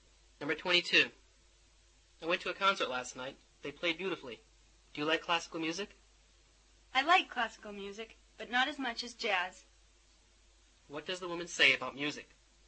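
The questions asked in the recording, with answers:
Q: What does the woman say about music?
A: She prefers jazz to classical music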